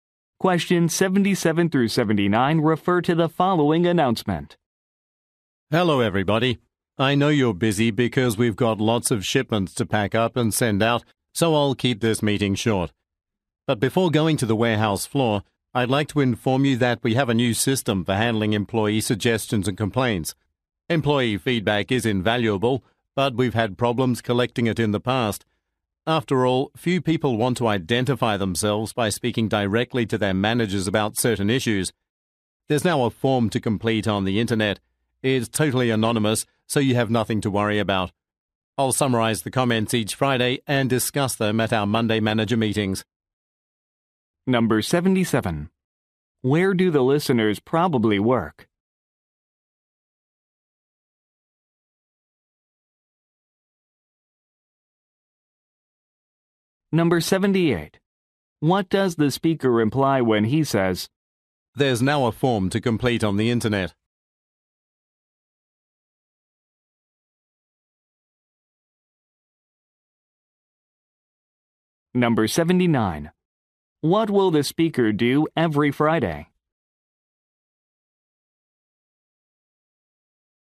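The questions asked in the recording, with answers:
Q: Where do the listeners probably work?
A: At a warehouse

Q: What will the speaker do every Friday?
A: Summarize the employee comments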